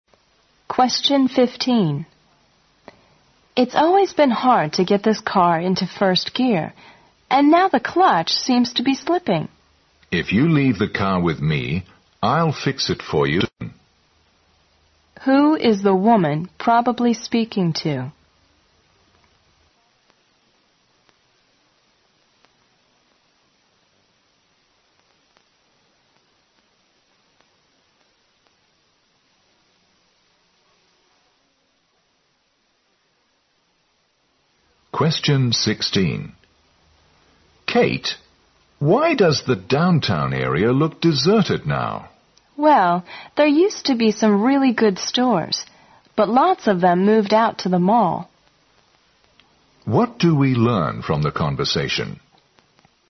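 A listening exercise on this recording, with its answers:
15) Who is the woman probably speaking to?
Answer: A mechanic.

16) What do we learn from the conversation?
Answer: There isn't much business downtown nowadays.

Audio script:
W: It's always been hard to get this car into first gear and now the clutch seems to be sleeping.
M: If you leave the car with me, I'll fix it for you this afternoon.
Q: Who is the woman probably speaking to?
M: Kate, why does the downtown area look deserted now?
W: Well, there used to be some really good stores, but lots of them moved out to the mall.
Q: What do we learn from the conversation?

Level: 六级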